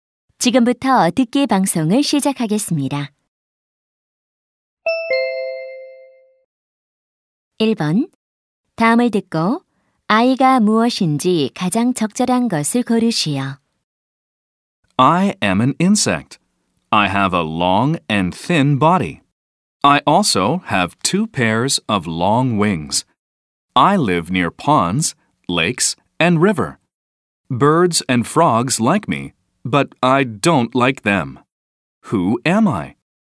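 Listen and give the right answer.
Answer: 잠자리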